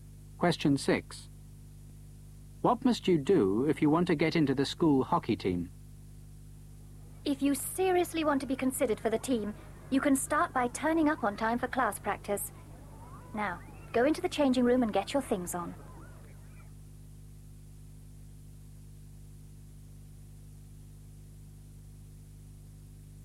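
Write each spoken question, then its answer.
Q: What must you do if you want to get into the school hockey team?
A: Turn up on time for class practice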